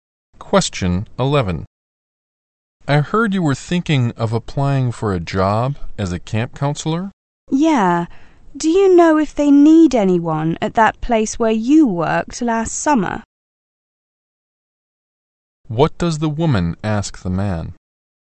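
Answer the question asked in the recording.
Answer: Whether the place where he worked last summer needs camp counselors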